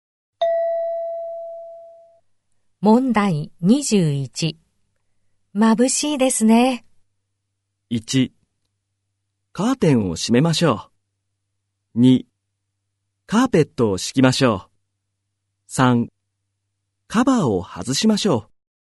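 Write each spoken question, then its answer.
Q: 眩しいですね。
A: 1: カーテンを閉めましょう。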